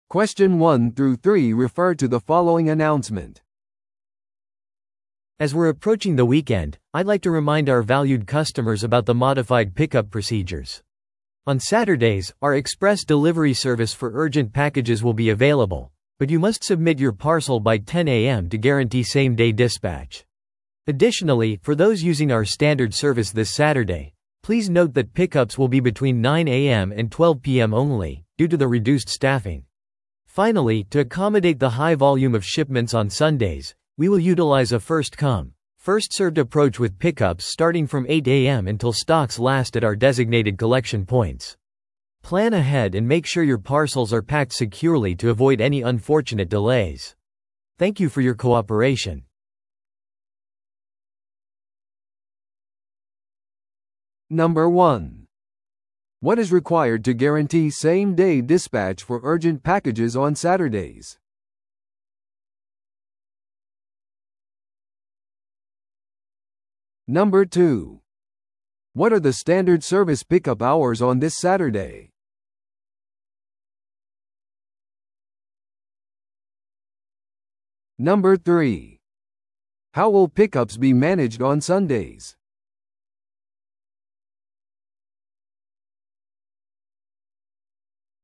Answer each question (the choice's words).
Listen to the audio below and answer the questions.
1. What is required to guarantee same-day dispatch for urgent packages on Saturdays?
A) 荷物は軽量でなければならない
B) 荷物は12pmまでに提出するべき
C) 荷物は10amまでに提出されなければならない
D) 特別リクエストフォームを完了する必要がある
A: 荷物は10amまでに提出されなければならない

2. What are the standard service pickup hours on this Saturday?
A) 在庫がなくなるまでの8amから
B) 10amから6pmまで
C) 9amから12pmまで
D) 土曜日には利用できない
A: 9amから12pmまで

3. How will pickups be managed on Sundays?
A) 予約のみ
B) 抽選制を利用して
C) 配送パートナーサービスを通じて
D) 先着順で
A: 先着順で

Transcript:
As we're approaching the weekend, I'd like to remind our valued customers about the modified pickup procedures. On Saturdays, our express delivery service for urgent packages will be available, but you must submit your parcel by 10am to guarantee same-day dispatch. Additionally, for those using our standard service this Saturday, please note that pickups will be between 9am and 12pm only, due to the reduced staffing. Finally, to accommodate the high volume of shipments on Sundays, we will utilize a first-come, first-served approach with pickups starting from 8am until stocks last at our designated collection points. Plan ahead and make sure your parcels are packed securely to avoid any unfortunate delays. Thank you for your cooperation.